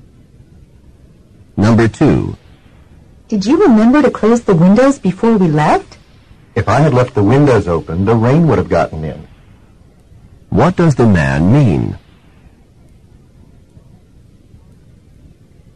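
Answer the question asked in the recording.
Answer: He closed the windows, so the rain didn't get in.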